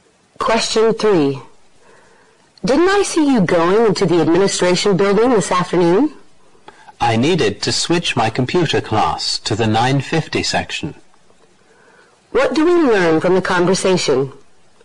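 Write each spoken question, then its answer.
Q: What do we learn from the conversation?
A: The speaker went to switch to the 9:50 section of the computer class.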